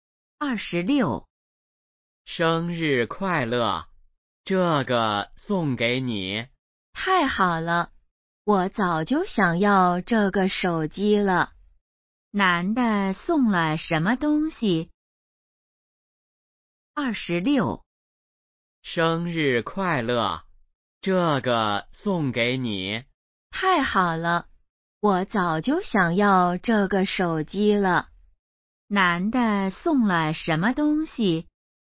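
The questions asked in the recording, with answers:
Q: 男的送了什么东西?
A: 手机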